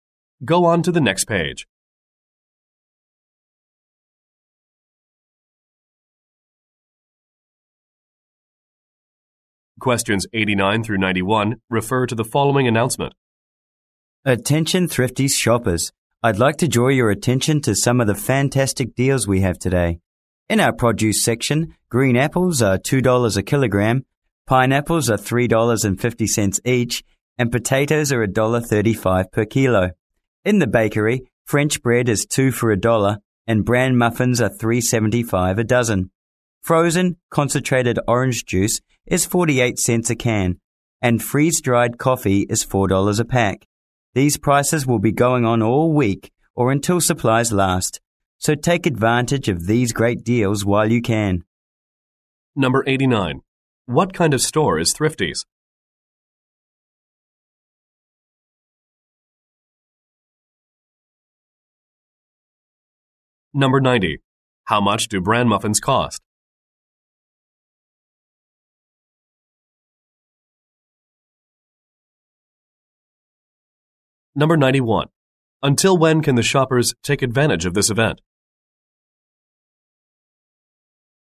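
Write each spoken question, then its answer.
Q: What kind of store is Thrifty's?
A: A grocery store

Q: How much do bran muffins cost?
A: $3.75 a dozen

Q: Until when can the shoppers take advantage of this event?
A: All week or until supplies last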